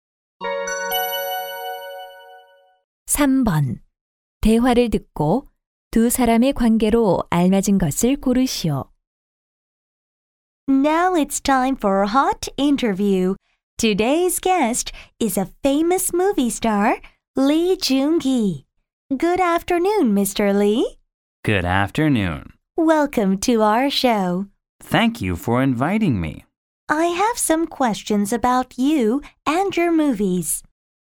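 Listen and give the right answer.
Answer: 쇼 진행자(인터뷰 진행자)와 영화배우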